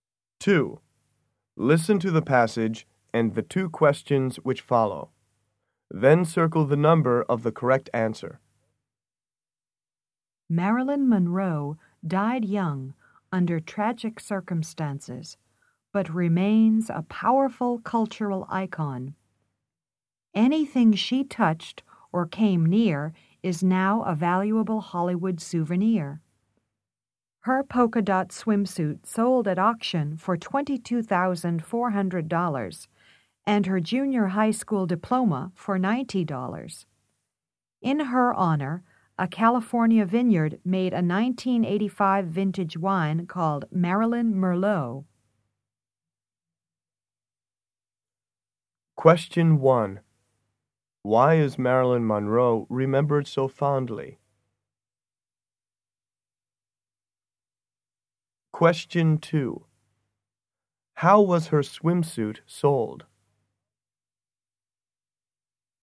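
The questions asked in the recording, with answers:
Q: How was her swimsuit sold?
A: At auction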